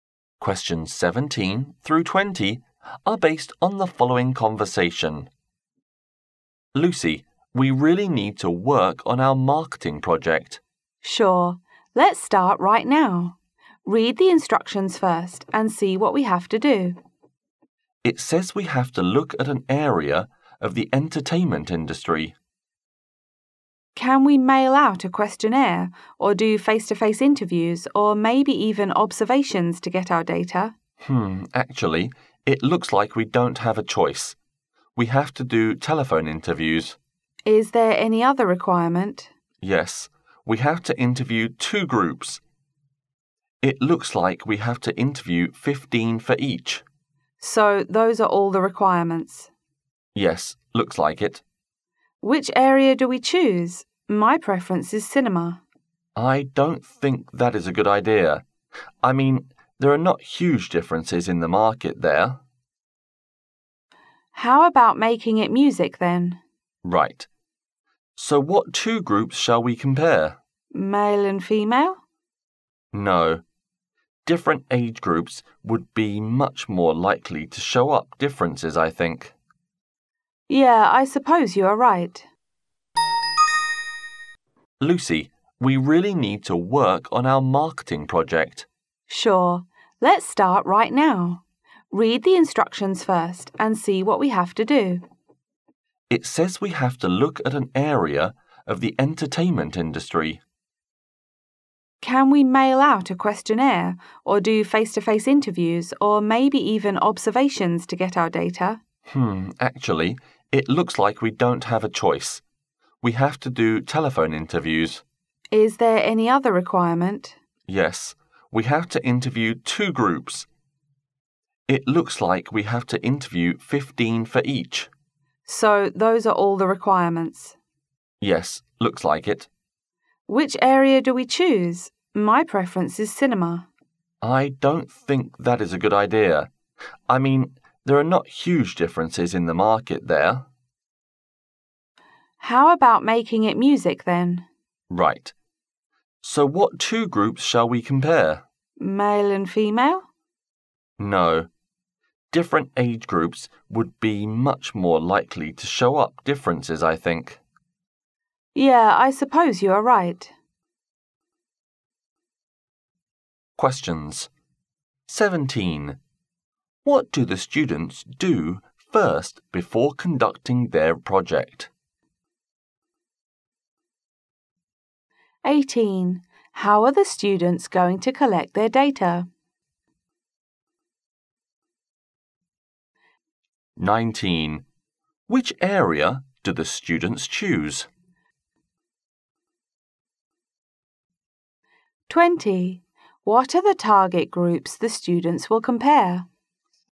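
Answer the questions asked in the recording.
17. Read the instructions
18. By telephone interviews
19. Music
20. Different age groups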